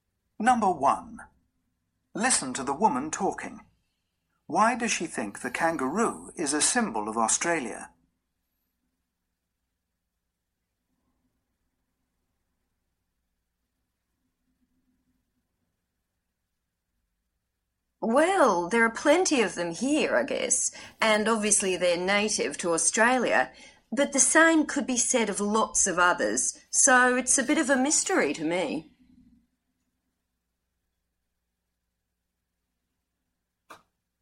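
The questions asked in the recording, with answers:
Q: Why does she think the kangaroo is a symbol of Australia?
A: She doesn't know; it's a mystery to her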